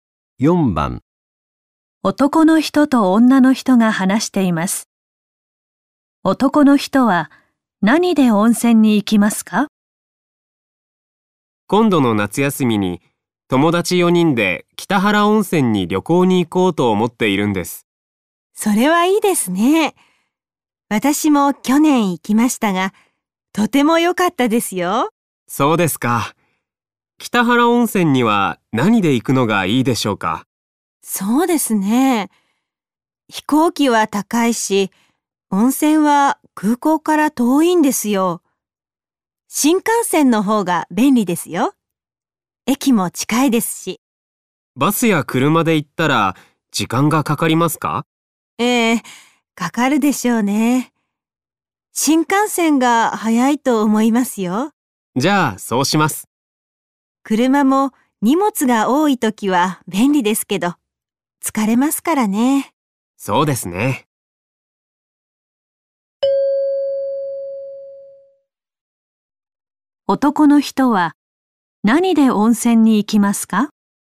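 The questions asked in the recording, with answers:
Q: 男の人は何で温泉に行きますか?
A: 新幹線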